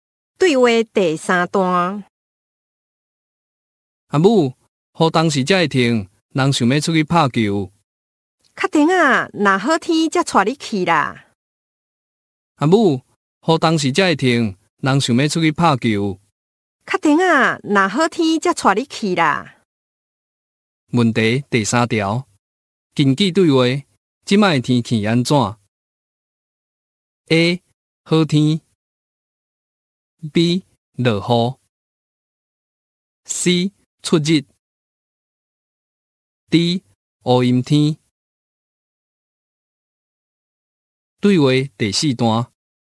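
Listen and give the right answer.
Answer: B: 落雨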